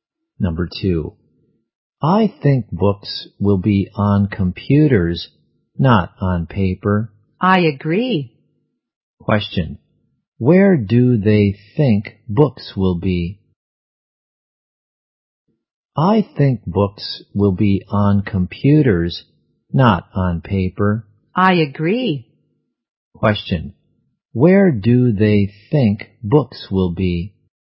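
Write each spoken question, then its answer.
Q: where do they think books will be?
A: On computers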